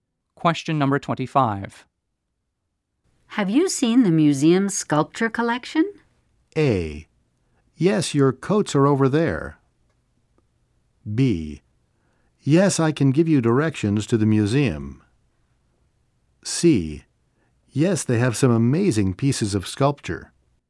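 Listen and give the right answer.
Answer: C: Yes, they have some amazing pieces of sculpture.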